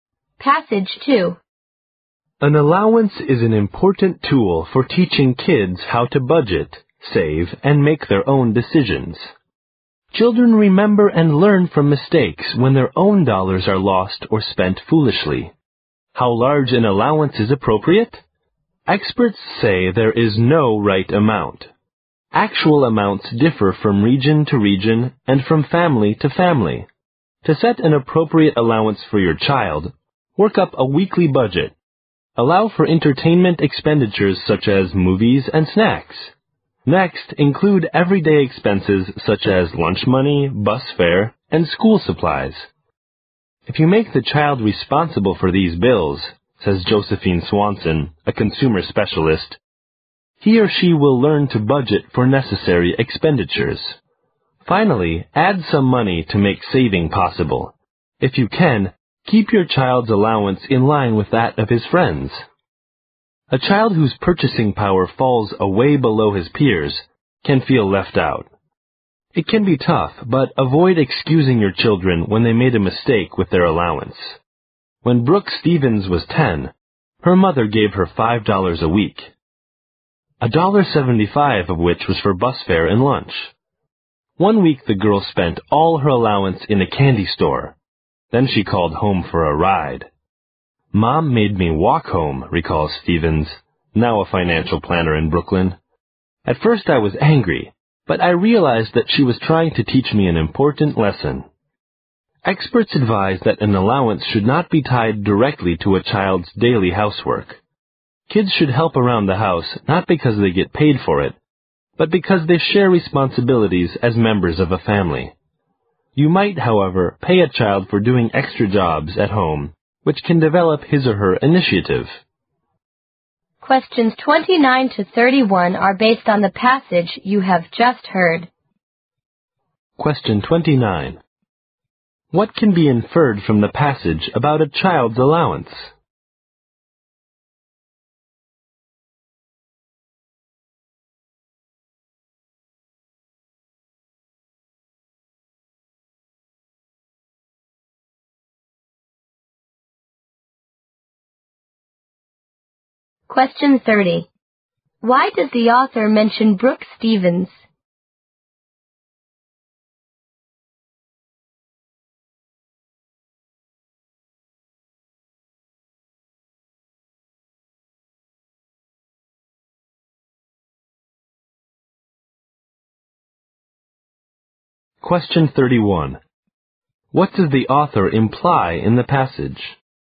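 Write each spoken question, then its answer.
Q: Why does the author mention Brooke Stevens?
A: To show that parents should not excuse children's mistakes with their allowance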